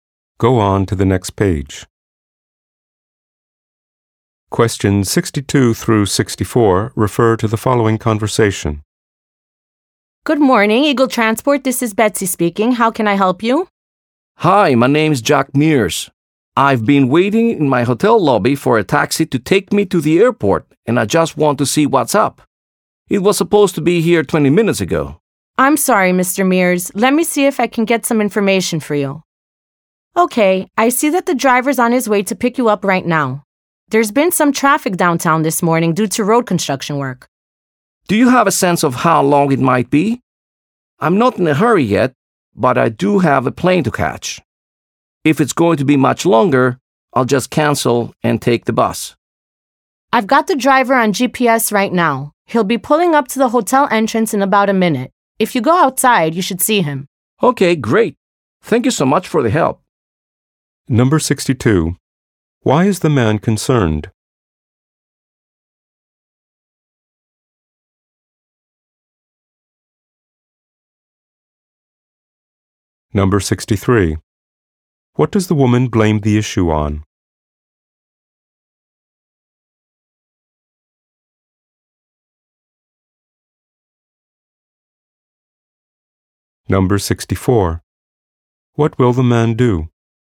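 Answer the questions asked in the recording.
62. His taxi is 20 minutes late and he has a plane to catch
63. Traffic from road construction downtown
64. Go outside to meet the taxi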